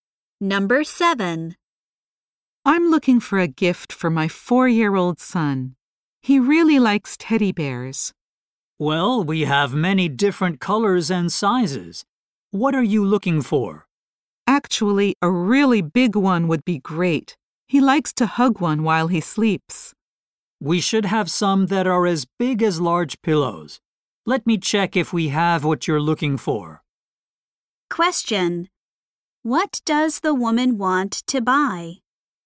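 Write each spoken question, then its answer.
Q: What does the woman want to buy?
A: A big teddy bear for her son.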